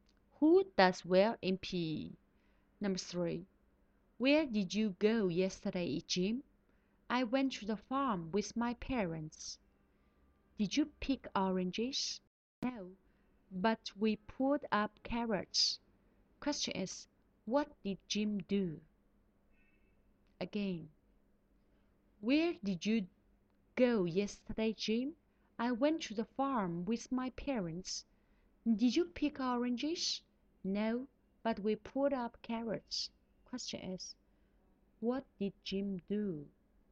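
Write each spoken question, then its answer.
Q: what did Jim do?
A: He pulled up carrots on the farm.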